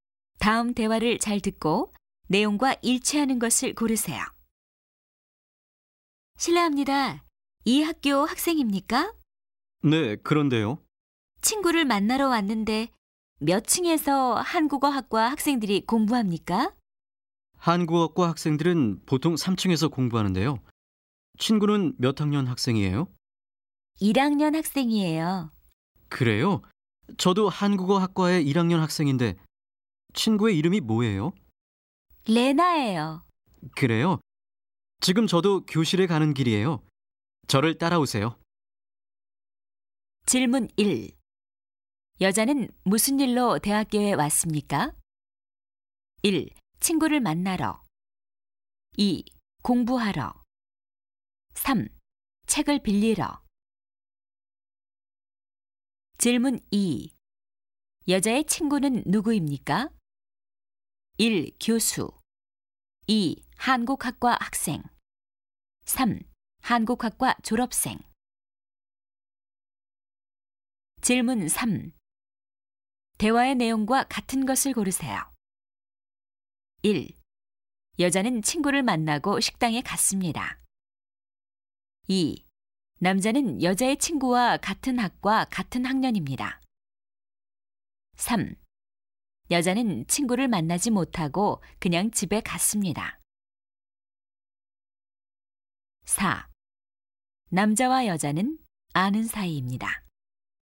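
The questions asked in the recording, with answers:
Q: 여자는 무슨 일로 대학교에 왔습니까?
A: 1: 친구를 만나러

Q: 여자의 친구는 누구입니까?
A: 2: 한국학과 학생

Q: 대화의 내용과 같은 것을 고르세요.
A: 2: 남자는 여자의 친구와 같은 학과 같은 학년입니다.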